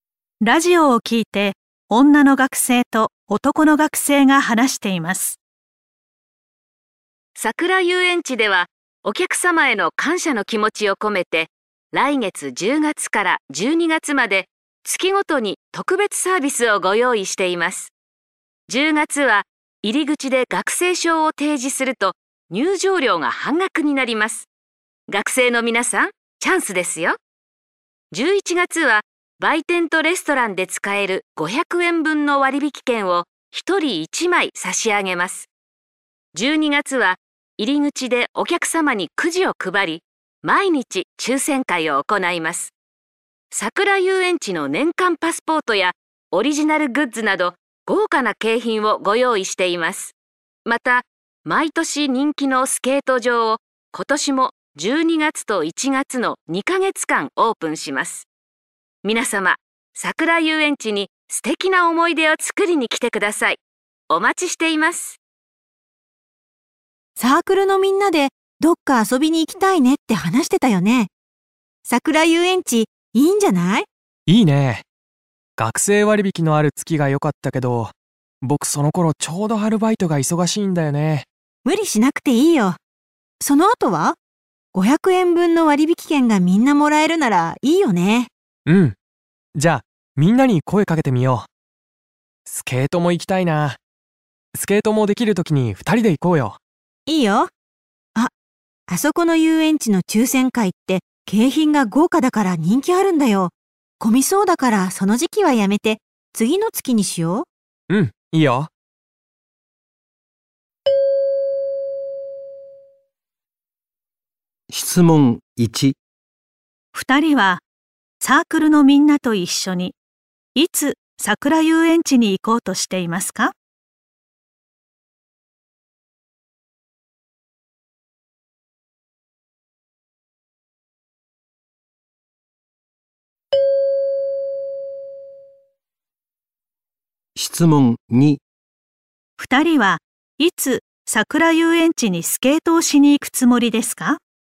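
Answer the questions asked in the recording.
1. 11月
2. 1月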